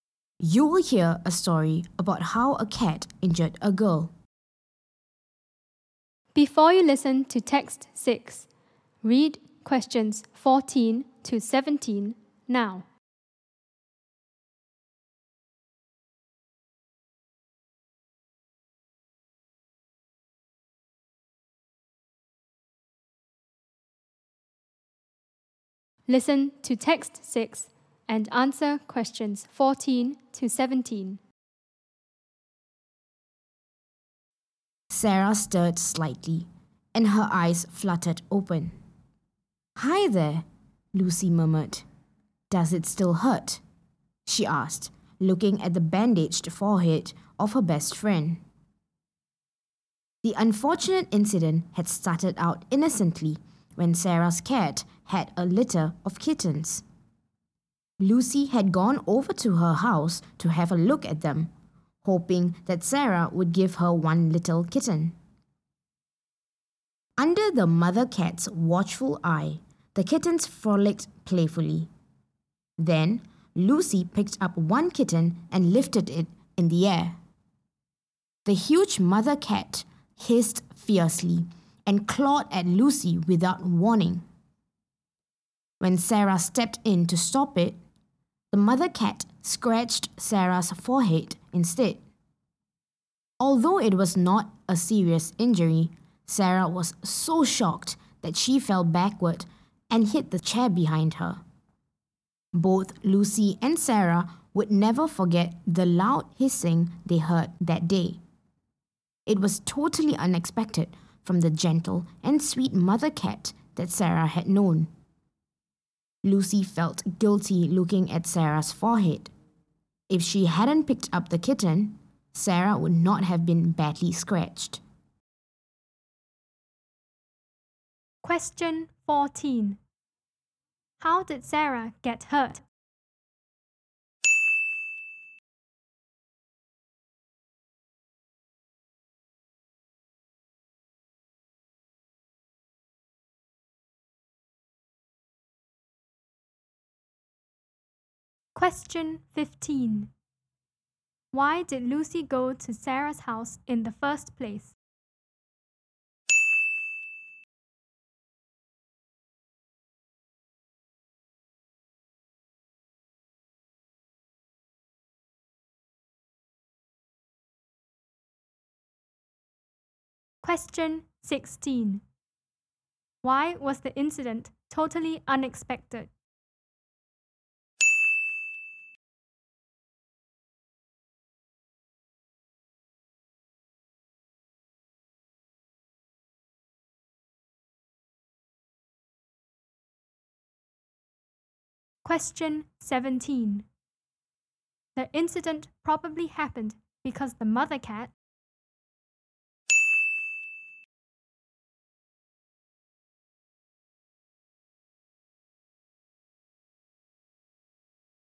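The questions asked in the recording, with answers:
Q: How did Sarah get hurt?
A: The mother cat scratched her forehead when she stepped in to stop it.

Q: Why did Lucy go to Sarah's house in the first place?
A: To look at the kittens, hoping Sarah would give her one.

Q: Why was the incident totally unexpected?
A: The mother cat had always been gentle and sweet.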